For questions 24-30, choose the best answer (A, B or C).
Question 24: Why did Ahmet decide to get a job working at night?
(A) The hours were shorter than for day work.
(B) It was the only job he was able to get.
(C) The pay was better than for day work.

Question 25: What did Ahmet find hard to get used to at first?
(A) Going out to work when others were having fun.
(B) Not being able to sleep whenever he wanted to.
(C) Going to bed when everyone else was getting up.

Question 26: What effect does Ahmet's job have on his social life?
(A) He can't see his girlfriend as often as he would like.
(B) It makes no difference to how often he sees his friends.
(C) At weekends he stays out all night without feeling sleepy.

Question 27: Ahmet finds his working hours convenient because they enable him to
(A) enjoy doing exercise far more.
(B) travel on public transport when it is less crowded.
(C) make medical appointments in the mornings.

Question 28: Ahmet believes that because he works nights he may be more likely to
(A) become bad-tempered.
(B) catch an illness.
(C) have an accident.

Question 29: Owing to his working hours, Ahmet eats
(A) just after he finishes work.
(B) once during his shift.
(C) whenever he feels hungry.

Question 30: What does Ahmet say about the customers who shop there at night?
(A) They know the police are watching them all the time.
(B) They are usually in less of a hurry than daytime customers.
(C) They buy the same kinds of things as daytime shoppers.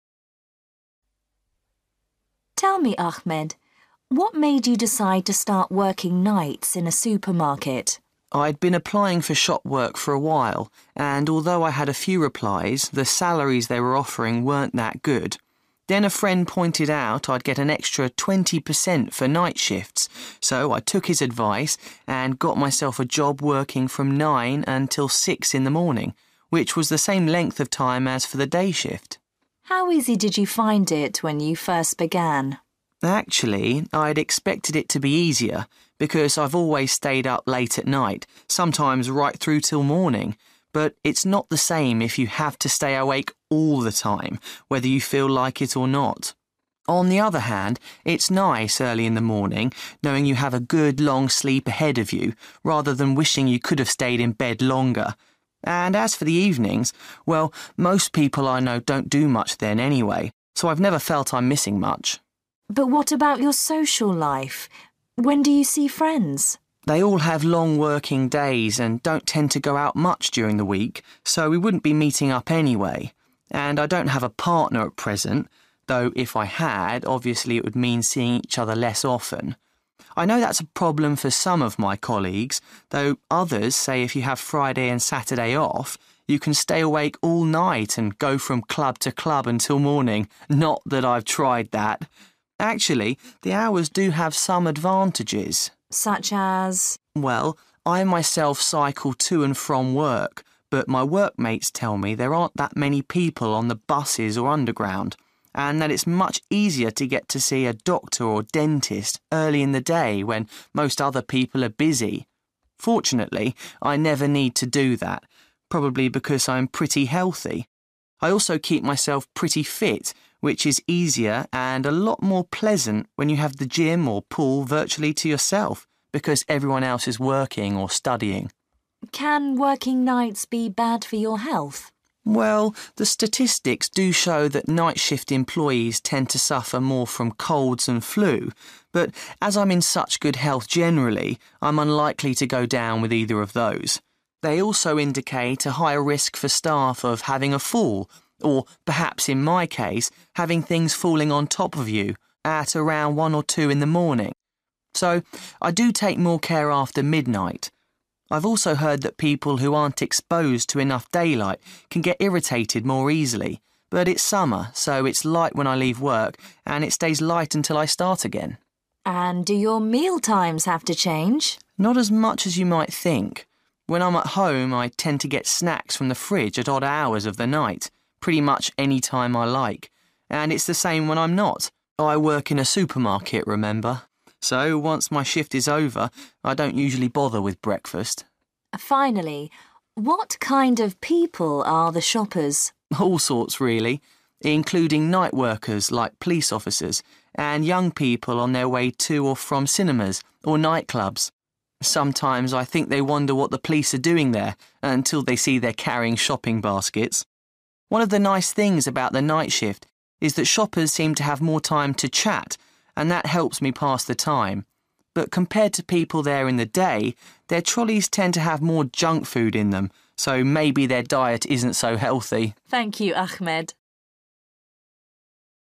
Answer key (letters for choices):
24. C
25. B
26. B
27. A
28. C
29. C
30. B

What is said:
Interviewer: Tell me, Ahmet, what made you decide to start working nights in a supermarket?
Ahmet: I'd been applying for shop work for a while, and although I had a few replies the salaries they were offering weren't that good. Then a friend pointed out I'd get an extra twenty per cent for night shifts, so I took his advice and got myself a job working from nine until six in the morning, which was the same length of time as for the day shift.
Interviewer: How easy did you find it when you first began?
Ahmet: Actually, I'd expected it to be easier, because I've always stayed up late at night – sometimes right through till morning – but it's not the same if you have to stay awake all the time whether you feel like it or not. On the other hand, it's nice early in the morning knowing you have a good long sleep ahead of you rather than wishing you could've stayed in bed longer. And as for the evenings, well, most people I know don't do much then anyway, so I've never felt I'm missing much.
Interviewer: But what about your social life? When do you see friends?
Ahmet: They all have long working days and don't tend to go out much during the week, so we wouldn't be meeting up anyway. And I don't have a partner at present, though if I had obviously it would mean seeing each other less often. I know that's a problem for some of my colleagues, though others say if you have Friday and Saturday off, you can stay awake all night and go from club to club until morning – not that I've tried that. Actually, the hours do have some advantages.
Interviewer: Such as?
Ahmet: Well, I myself cycle to and from work but my workmates tell me there aren't that many people on the buses or Underground, and that it's much easier to get to see a doctor or dentist early in the day when most other people are busy. Fortunately I never need to do that, probably because I am pretty healthy. I also keep myself pretty ft, which is easier and a lot more pleasant when you have the gym or the pool virtually to yourself because everyone else is working or studying.
Interviewer: Can working nights be bad for your health?
Ahmet: Well, the statistics do show that night-shift employees tend to suffer more from colds and flu, but as I'm in such good health generally I'm unlikely to go down with either of those. They also indicate a higher risk for staff of having a fall, or – perhaps in my case – having things falling on top of you, at around one or two in the morning. So I do take more care after midnight. I've also heard that people who aren't exposed to enough daylight can get irritated more easily, but it's summer so it's light when I leave work and it stays light until I start again.
Interviewer: And do your mealtimes have to change?
Ahmet: Not as much as you might think. When I'm at home I tend to get snacks from the fridge at odd hours of the night, pretty much anytime I like. And it's the same when I'm not. I work in a supermarket, remember. So once my shift is over I don't usually bother with breakfast.
Interviewer: Finally, what kind of people are the shoppers?
Ahmet: All sorts, really, including night workers like police officers, and young people on their way to or from cinemas or nightclubs. Sometimes I think they wonder what the police are doing there, until they see they're carrying shopping baskets. One of the nice things about the night shift is that shoppers seem to have more time to chat, and that helps me pass the time. But compared to people there in the day, their trolleys tend to have more junk food in them, so maybe their diet isn't so healthy.